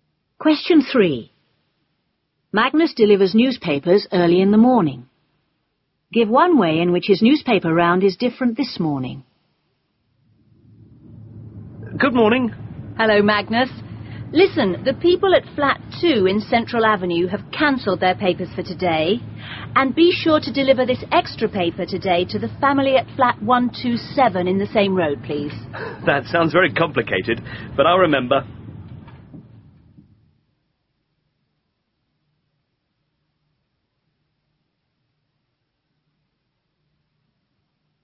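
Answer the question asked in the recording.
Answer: No papers for Flat 2 in Central Avenue, or an extra paper for Flat 127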